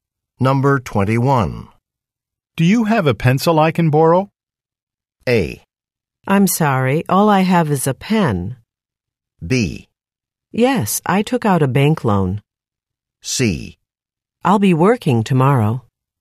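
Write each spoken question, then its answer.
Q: Do you have a pencil I can borrow?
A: A: I'm sorry, all I have is a pen.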